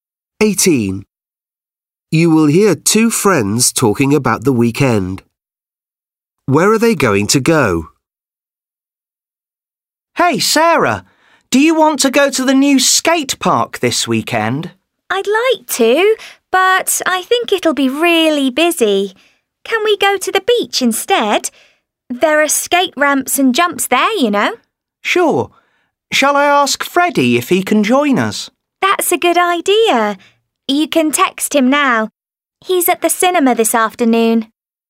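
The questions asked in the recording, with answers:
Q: Where are they going to go?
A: The beach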